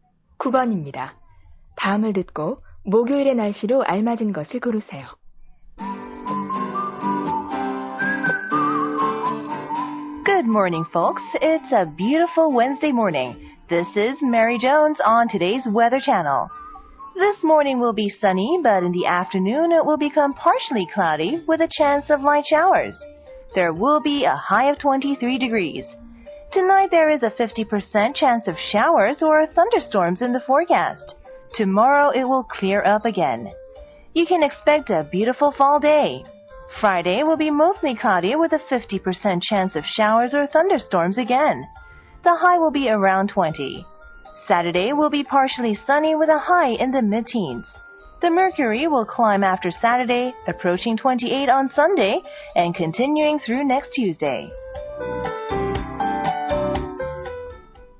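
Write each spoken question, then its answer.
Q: 다음을 듣고 목요일의 날씨로 알맞은 것을 고르세요.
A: 맑음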